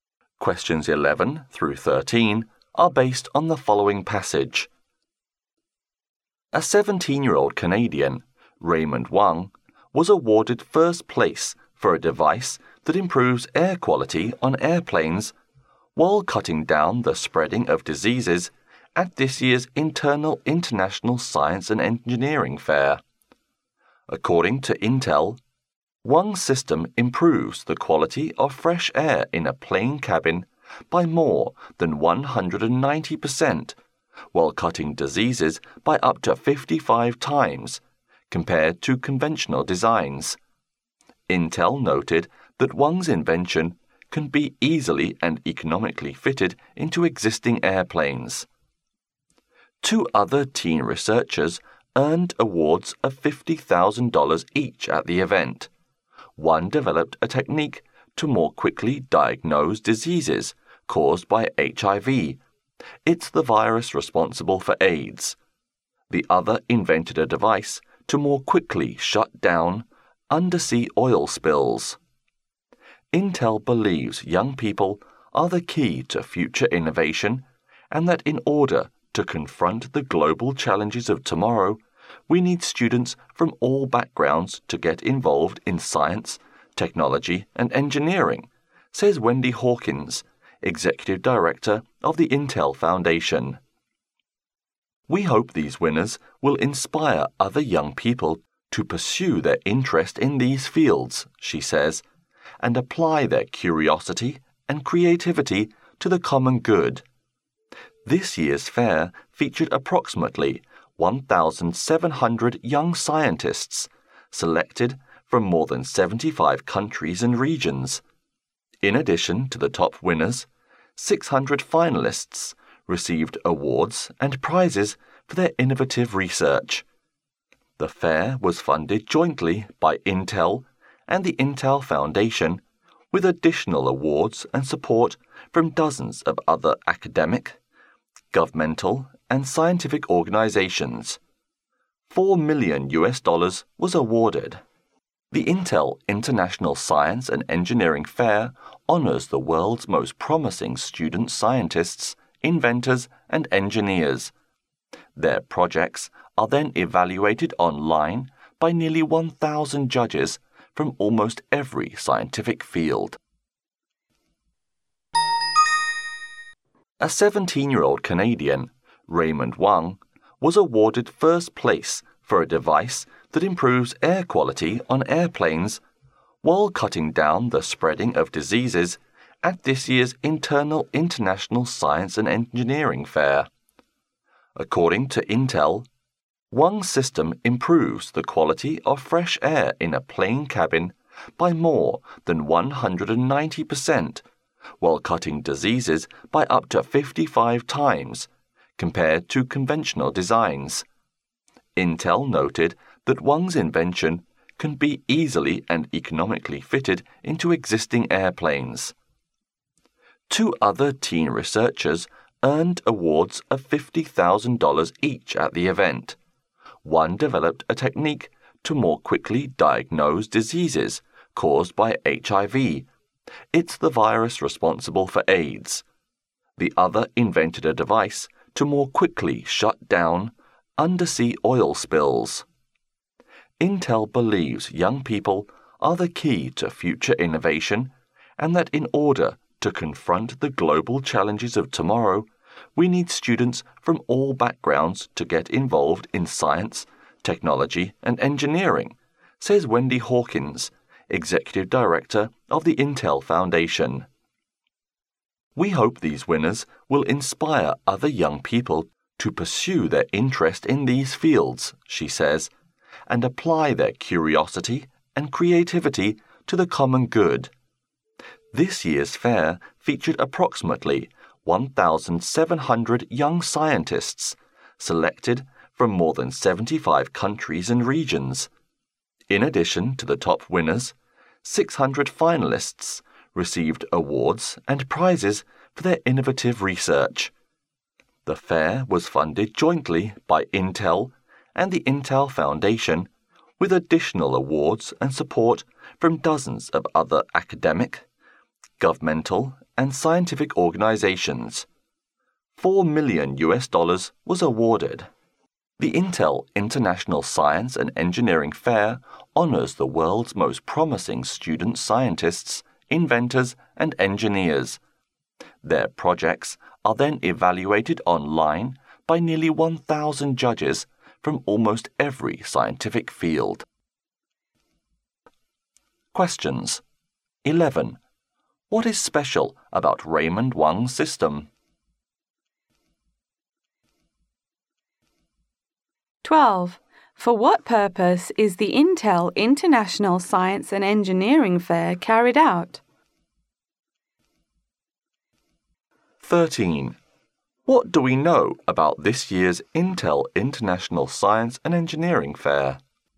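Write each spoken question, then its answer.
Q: What is special about Raymond Wang's system?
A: It improves air quality on planes and cuts down the spread of diseases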